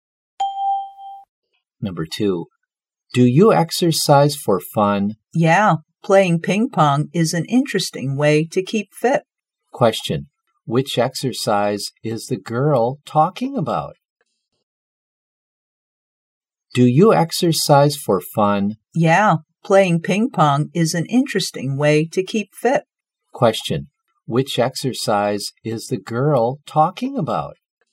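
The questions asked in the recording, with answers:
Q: which exercise is the girl talking about?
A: Ping pong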